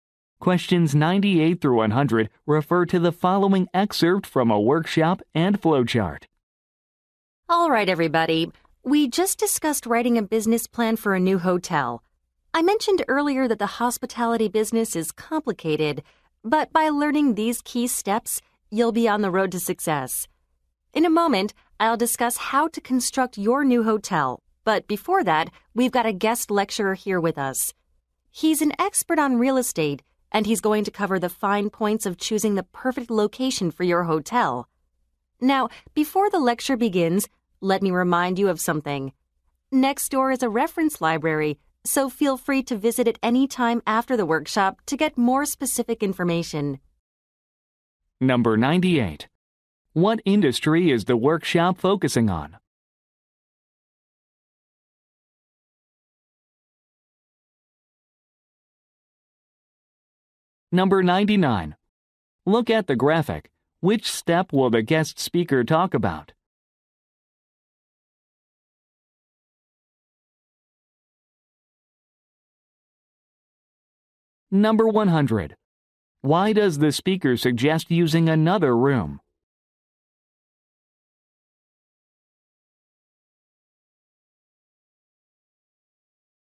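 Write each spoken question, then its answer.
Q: What industry is the workshop focusing on?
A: Hospitality (hotels)

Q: Why does the speaker suggest using another room?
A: To get more specific information in the reference library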